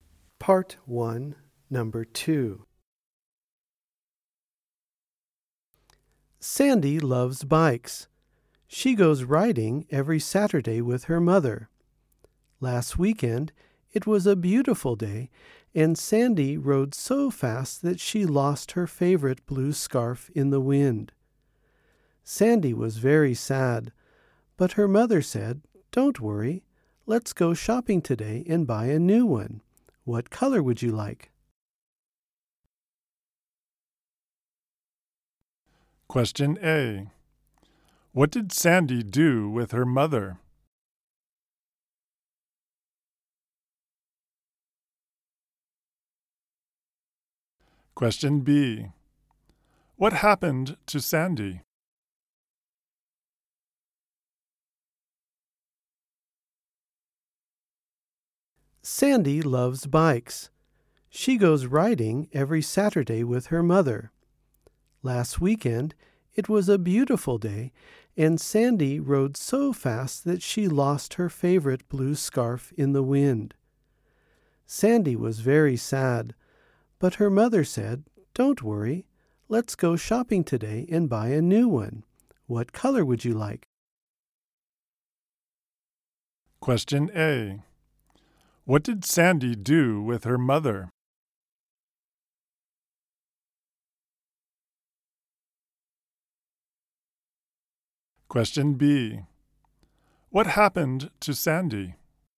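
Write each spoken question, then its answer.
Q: What did Sandy do with her mother?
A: She went bike riding

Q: What happened to Sandy?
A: She lost her favorite blue scarf in the wind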